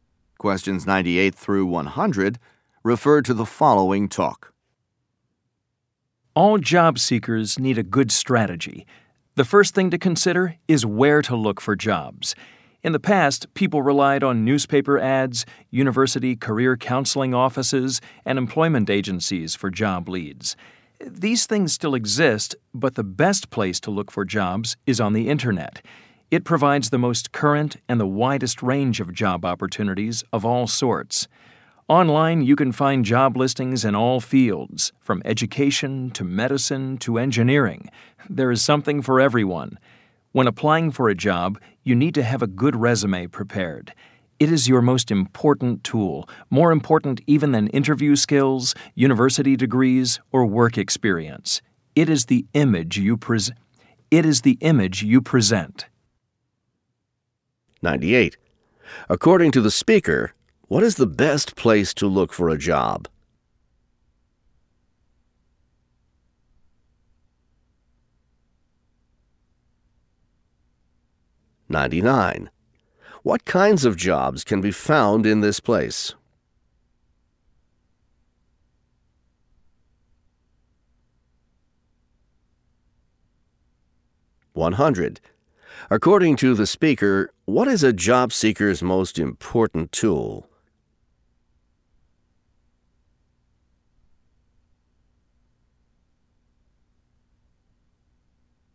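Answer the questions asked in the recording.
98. The internet
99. All kinds, in all fields
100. A good resume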